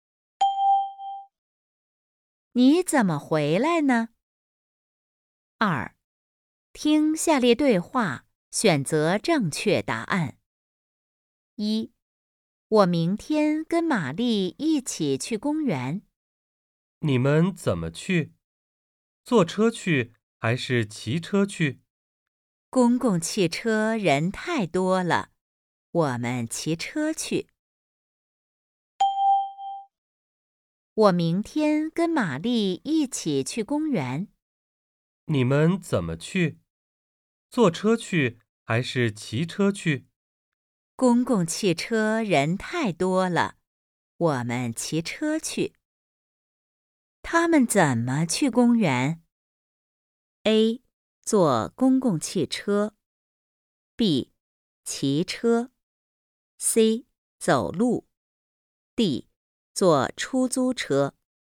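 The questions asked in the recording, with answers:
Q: 他们怎么去公园?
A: B: 骑车。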